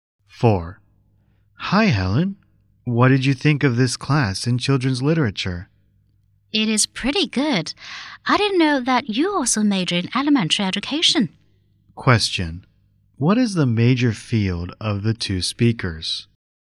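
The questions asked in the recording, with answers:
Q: What is the major field of the two speakers?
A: Elementary education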